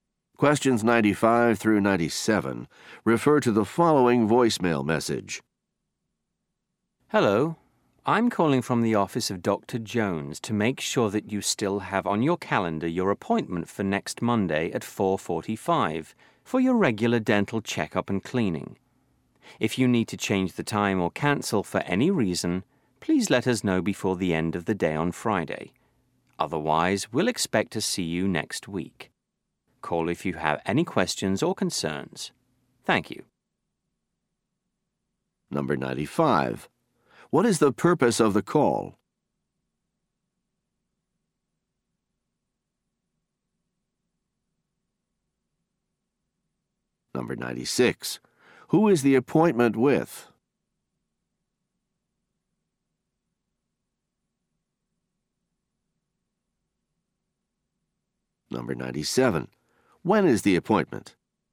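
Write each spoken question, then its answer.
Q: What is the purpose of the call?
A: To confirm an appointment

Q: Who is the appointment with?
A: Dr. Jones, a dentist

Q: When is the appointment?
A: Next Monday at 4:45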